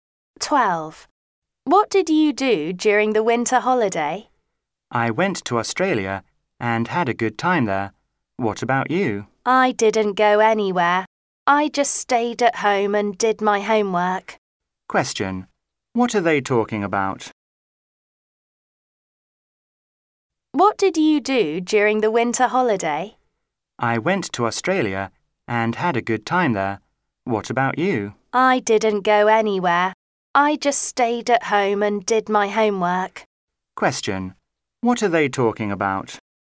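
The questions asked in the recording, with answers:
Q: Question: what are they talking about?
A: What they did during the winter holiday.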